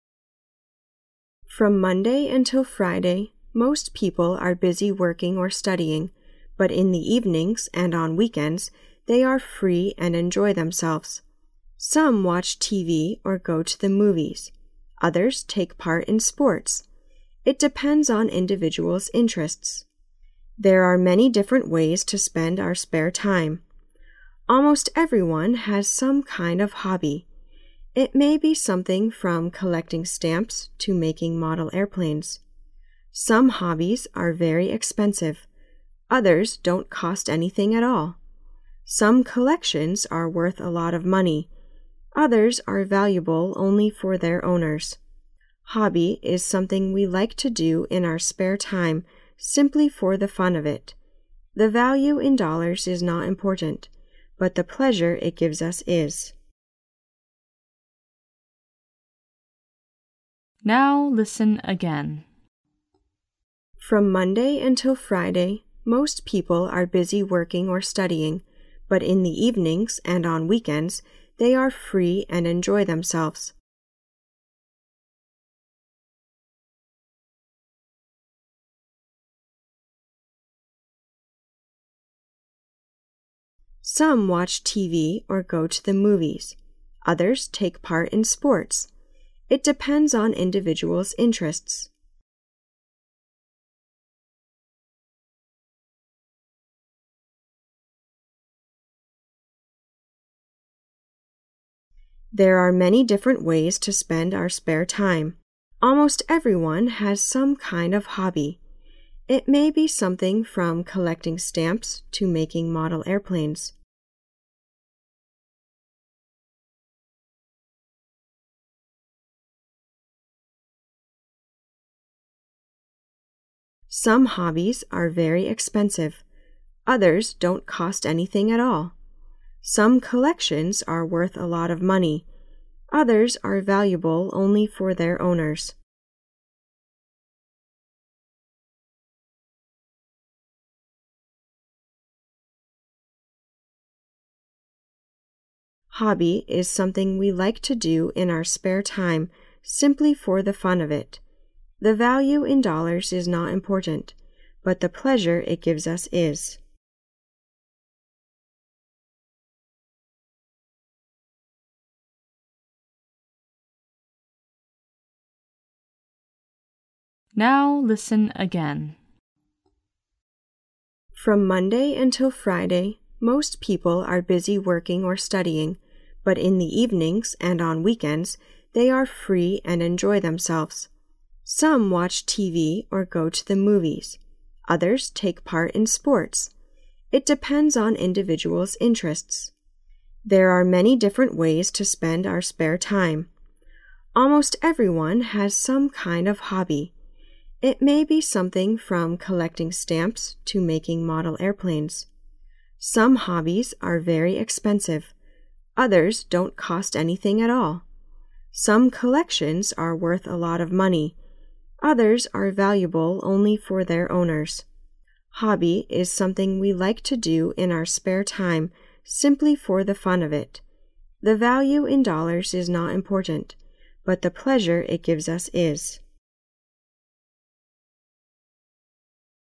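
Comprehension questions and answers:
During the second reading, you are required to put the missing words or phrases on the Answer Sheet in order of the numbered blanks according to what you hear.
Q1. From Monday until Friday most people are busy working or studying, but in the evenings and on 1 they are free and enjoy themselves.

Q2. It 2 individuals interests.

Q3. It may be something from collecting stamps to making 3 .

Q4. Some collections are worth a lot of money; others are valuable only for their 4 .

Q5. The value in dollars is not important, but the 5 it gives us is.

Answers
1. weekends
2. depends on
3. model airplanes
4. owners
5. pleasure

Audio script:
[听力原文] From Monday until Friday most people are busy working or studying, but in the evenings and on weekends they are free and enjoy themselves. Some watch TV or go to the movies; others take part in sports. It depends on individuals interests. 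There are many different ways to spend our spare time. Almost everyone has some kind of hobby. It may be something from collecting stamps to making model airplanes. Some hobbies are very expensive; others don't cost anything at all. Some collections are worth a lot of money; others are valuable only for their owners. Hobby is something we like to do in our spare time simply for the fun of it. The value in dollars is not important, but the pleasure it gives us is.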